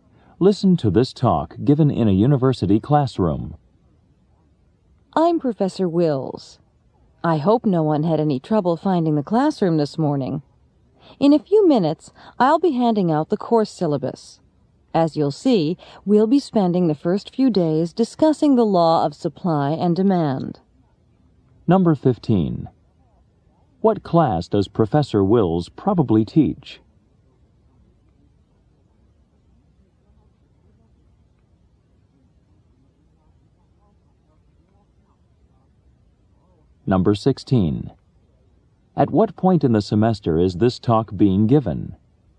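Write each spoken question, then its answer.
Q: What class does Professor Wills probably teach?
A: Economics

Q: At what point in the semester is this talk being given?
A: At the beginning, on the first day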